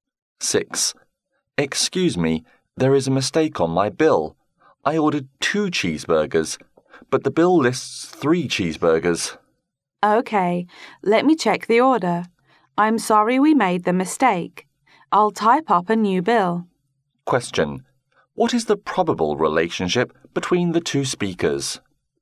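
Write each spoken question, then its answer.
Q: What is the probable relationship between the two speakers?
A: Customer and waiter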